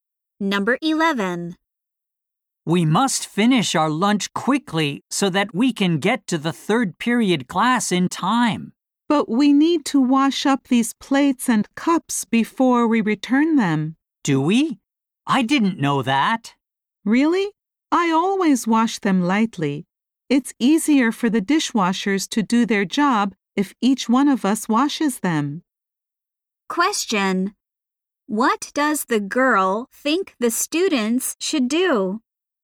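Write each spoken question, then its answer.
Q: What does the girl think the students should do?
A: Wash their plates and cups before returning them.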